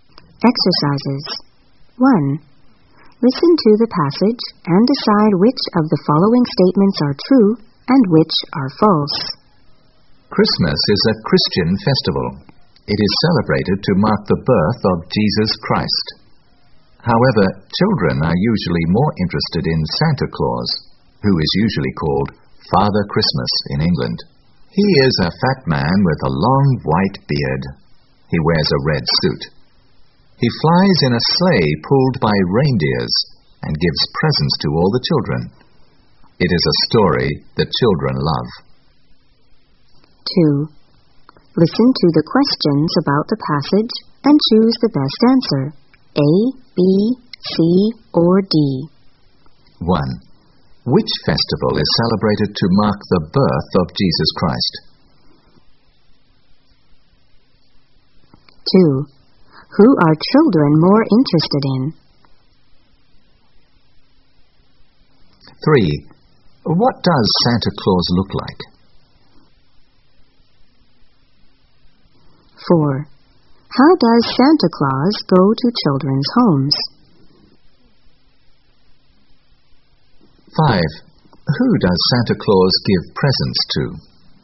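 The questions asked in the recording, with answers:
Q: Which festival is celebrated to mark the birth of Jesus Christ?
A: Christmas

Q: Who are children more interested in?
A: Santa Claus

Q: What does Santa Claus look like?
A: A fat man with a long white beard, wearing a red suit

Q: How does Santa Claus go to children's homes?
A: He flies in a sleigh pulled by reindeers

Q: Who does Santa Claus give presents to?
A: All the children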